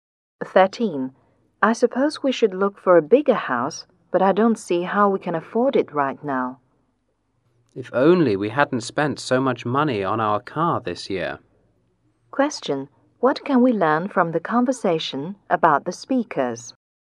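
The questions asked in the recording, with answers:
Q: What can we learn from the conversation about the speakers?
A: They can't afford a bigger house now because they spent a lot on their car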